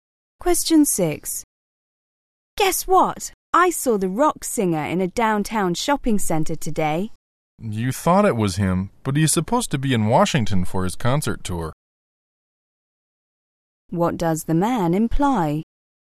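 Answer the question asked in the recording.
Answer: The woman probably saw someone else, since the singer is in Washington.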